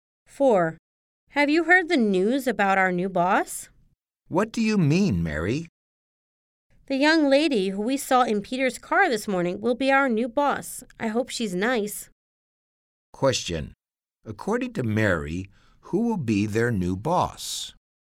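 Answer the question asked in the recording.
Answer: The young lady they saw in Peter's car this morning.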